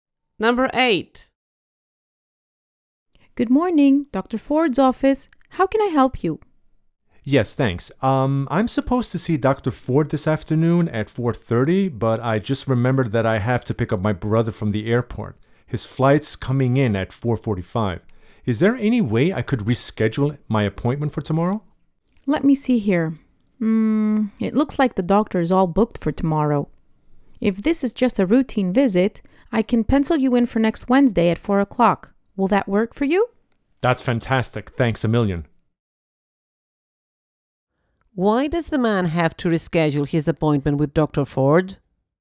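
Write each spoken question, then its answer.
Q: Why does the man have to reschedule his appointment with Dr.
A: He has to pick up his brother from the airport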